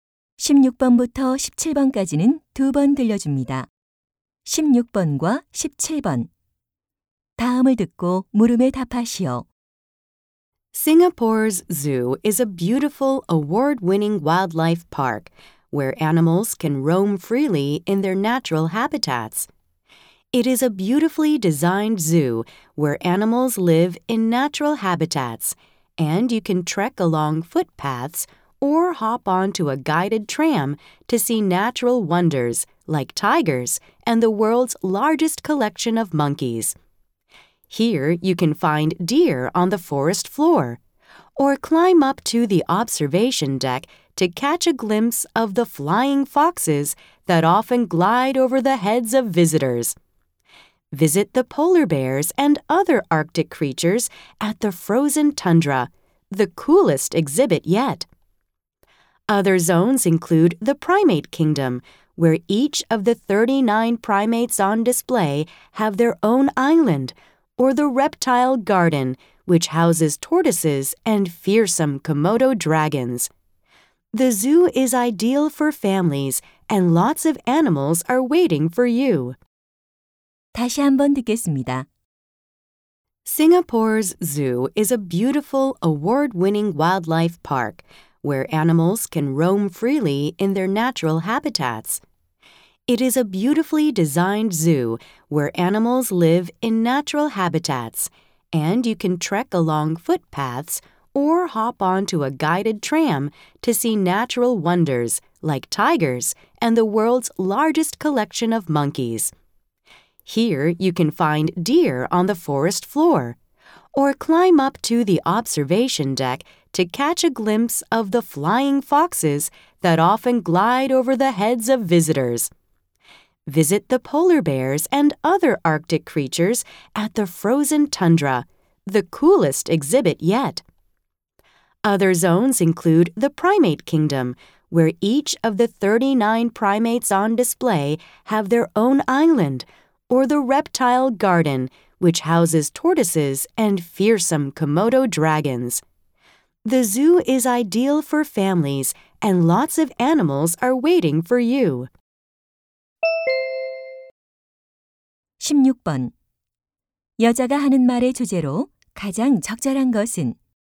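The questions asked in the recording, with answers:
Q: 여자가 하는 말의 주제로 가장 적절한 것은?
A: 싱가포르 동물원 소개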